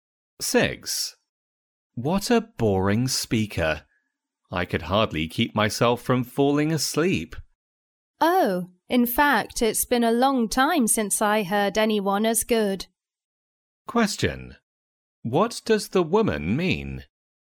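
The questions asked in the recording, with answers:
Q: What does the woman mean?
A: She thought the speaker was very good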